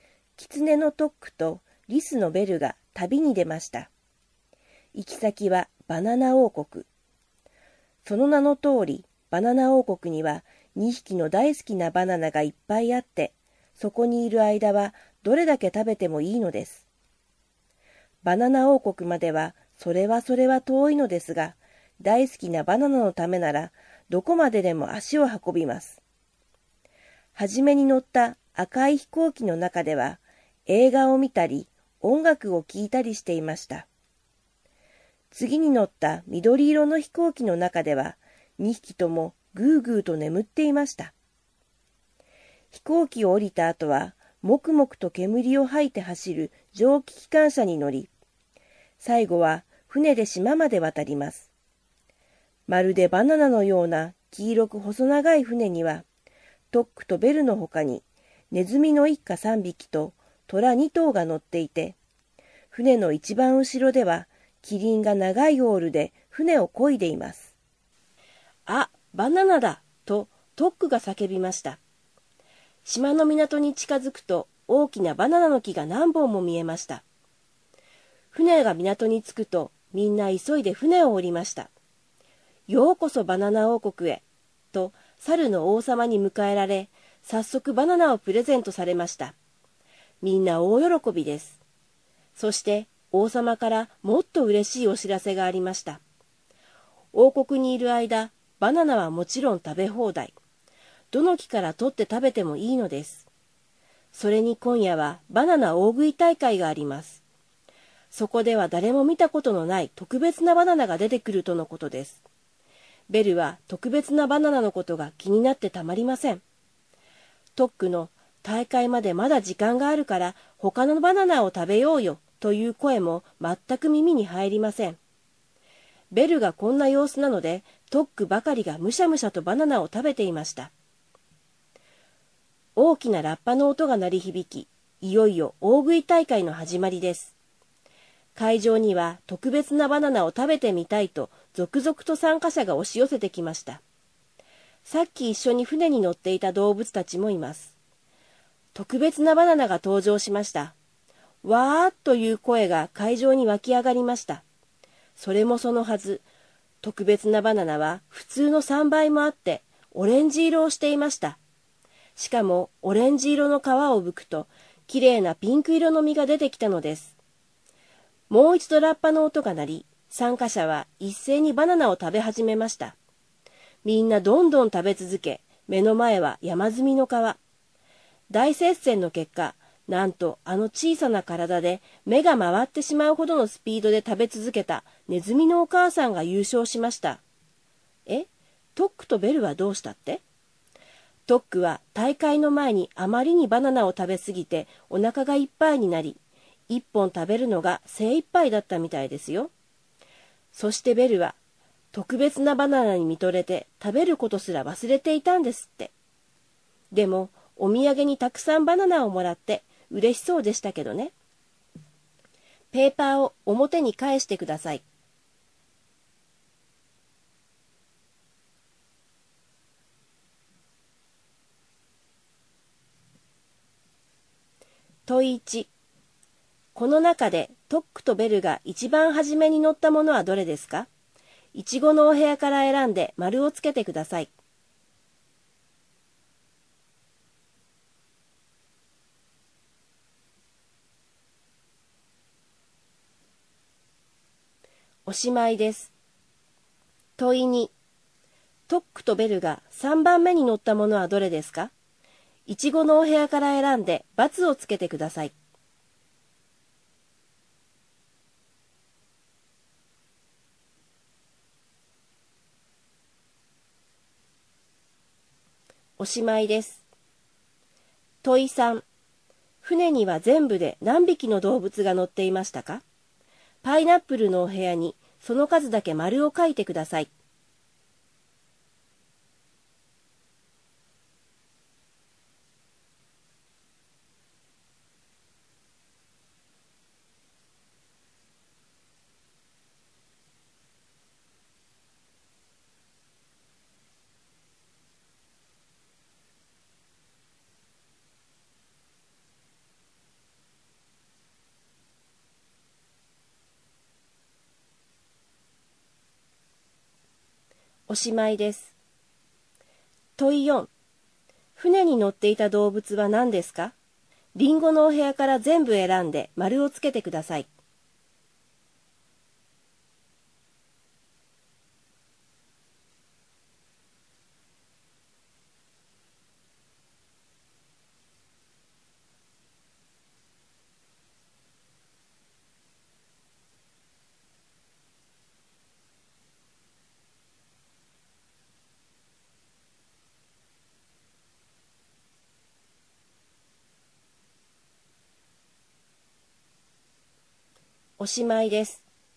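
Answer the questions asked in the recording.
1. 赤い飛行機
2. 蒸気機関車
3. 8匹
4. キツネ、リス、ネズミ、虎、キリン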